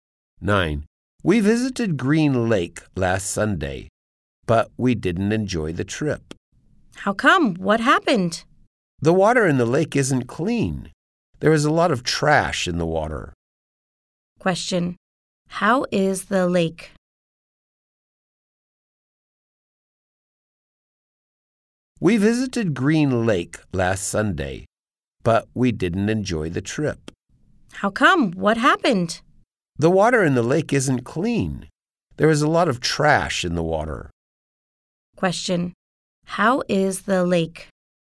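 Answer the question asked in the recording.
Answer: Dirty, with a lot of trash in the water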